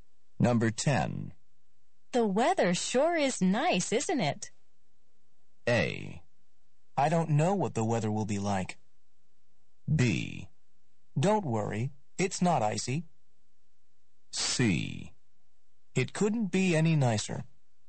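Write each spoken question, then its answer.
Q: The weather sure is nice, isn't it?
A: C: It couldn't be any nicer.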